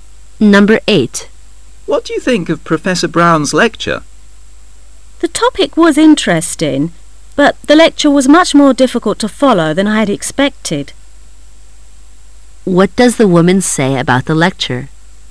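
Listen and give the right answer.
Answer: It was harder to follow than she expected

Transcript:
[解析] M:What do you think of Professor Brown's lecture? W:The topic was interesting,but the lecture was much more difficult to follow than I had expected. Q:What does the woman say about the lecture?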